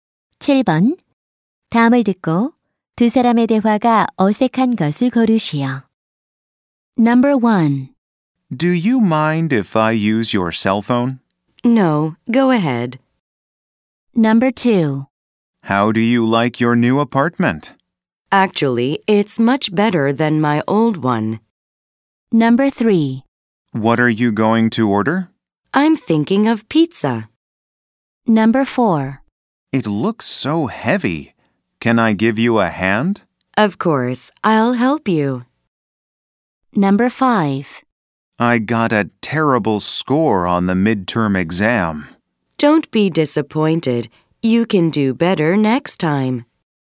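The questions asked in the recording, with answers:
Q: 다음을 듣고 두 사람의 대화가 어색한 것을 고르시오.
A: 4번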